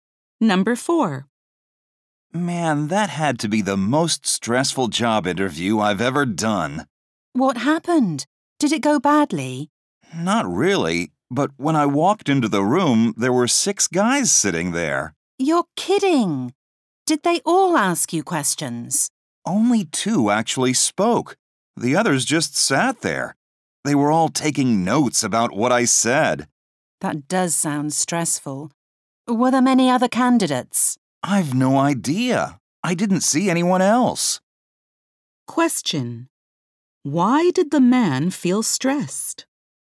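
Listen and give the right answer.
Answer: Six interviewers were there, all taking notes on what he said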